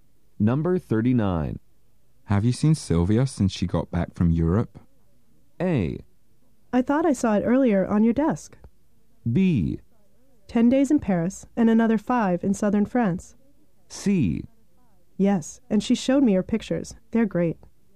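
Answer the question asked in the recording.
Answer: C: Yes, and she showed me her pictures.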